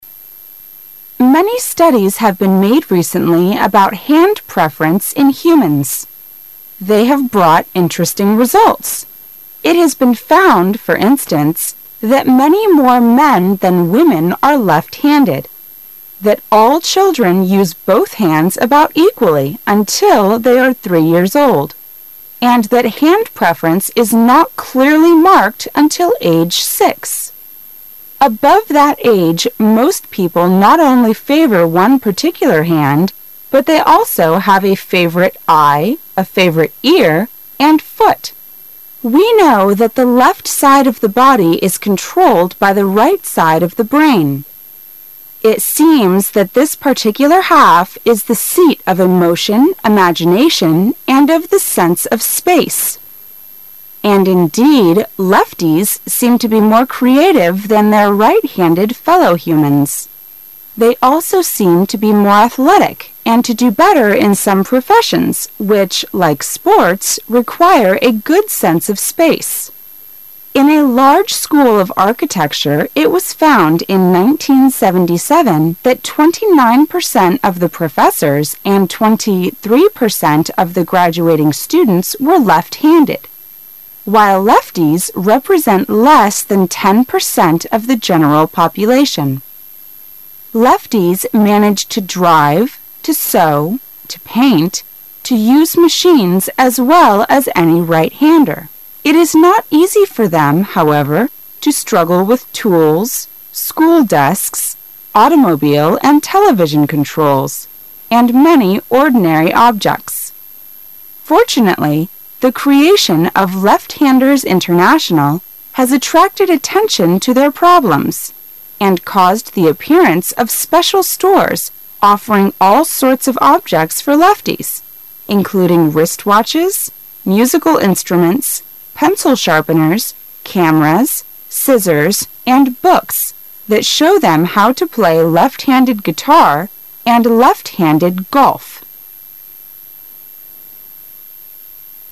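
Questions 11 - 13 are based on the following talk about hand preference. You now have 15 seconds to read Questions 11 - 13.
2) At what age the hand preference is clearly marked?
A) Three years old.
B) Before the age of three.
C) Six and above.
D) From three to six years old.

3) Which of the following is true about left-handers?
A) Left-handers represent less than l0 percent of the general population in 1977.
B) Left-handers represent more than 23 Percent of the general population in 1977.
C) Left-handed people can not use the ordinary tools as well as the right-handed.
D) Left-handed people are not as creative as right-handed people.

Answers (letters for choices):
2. C
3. A

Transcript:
[解析] 11-13 Many studies have been made recently about hand preference in humans. They have brought interesting results. It has been found, for instance, that many more men than women are left-handed; that all children use both hands about equally until they are three years old; and that hand preference is not clearly marked until age six. 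Above that age, most people not only favor one particular hand, but they also have a favorite eye, a favorite ear and foot. We know that the left side of the body is controlled by the right side of the brain. It seems that this particular half is the seat of emotion, imagination, and of the sense of space. And, indeed, lefties seem to be more creative than their right-handed fellow humans; they also seem to be more athletic and to do better in some professions which like sports require a good sense of space. In a large school of architecture. it was found in 1977 that 29 percent of the professors and 23 percent of the graduating students were left-handed -- while lefties represent less than 10 percent of the general population. Lefties manage to drive, to sew, to paint, to use machines as well as any right-hander. It is not easy for them, however, to struggle with tools, school desks, automobile and television controls, and many ordinary objects. 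Fortunately the creation of Left-Handers International has attracted attention to their problems and caused the appearance of special stores offering all sorts of objects for lefties, including wrist-watches, musical instruments, pencil-sharpeners, cameras, scissors, and books that show them how to play left-handed guitar and left-handed golf.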